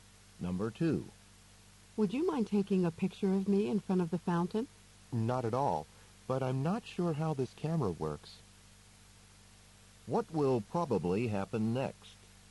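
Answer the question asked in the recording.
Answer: The man will take the woman's picture once he figures out the camera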